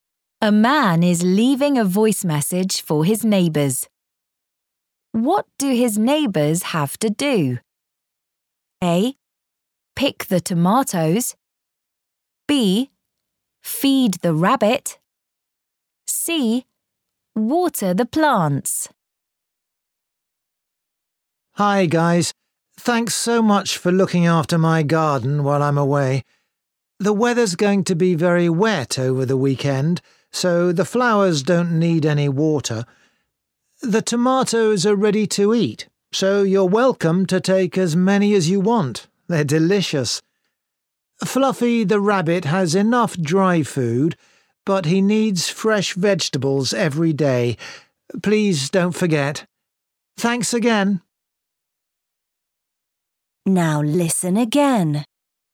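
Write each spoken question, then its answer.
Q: What do his neighbours have to do?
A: B: Feed the rabbit.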